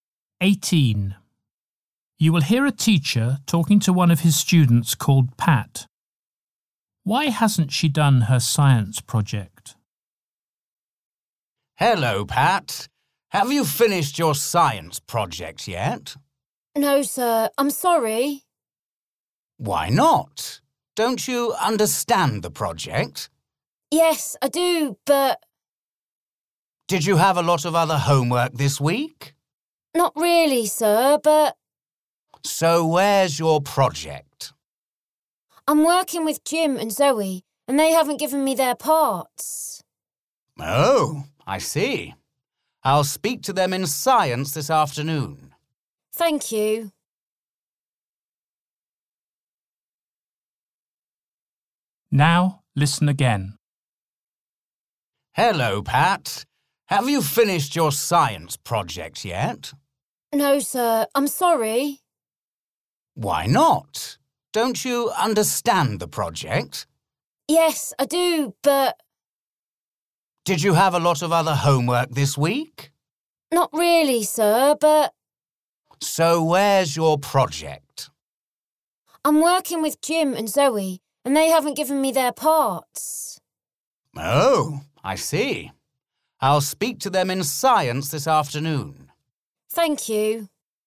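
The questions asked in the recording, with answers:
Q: Why hasn't she done her science project?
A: Jim and Zoe haven't given her their parts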